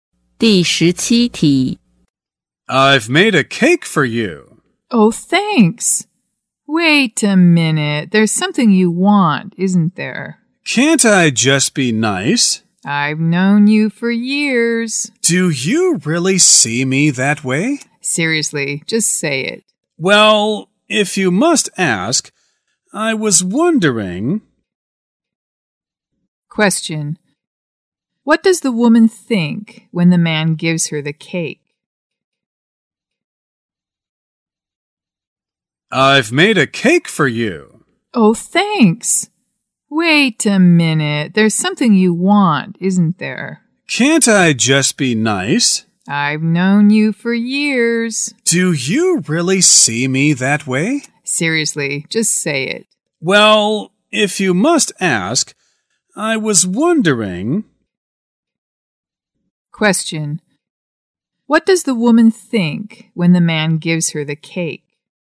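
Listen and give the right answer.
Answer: That he wants something from her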